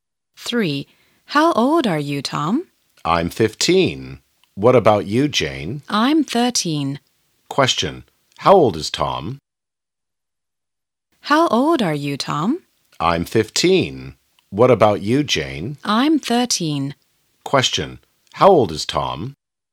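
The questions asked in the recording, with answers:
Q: Question. How old is Tom?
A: 15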